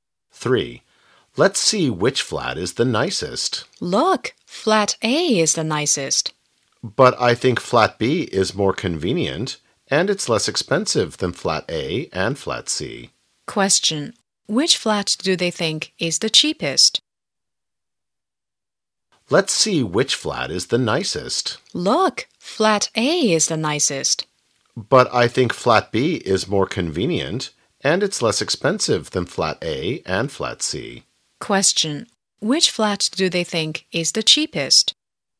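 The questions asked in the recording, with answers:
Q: Which flat do they think is the cheapest?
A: Flat B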